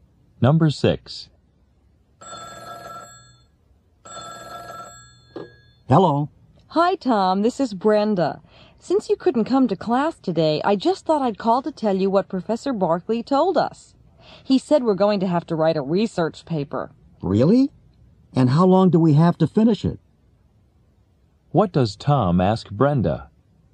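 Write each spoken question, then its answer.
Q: What does Tom ask Brenda?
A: How long they have to finish the research paper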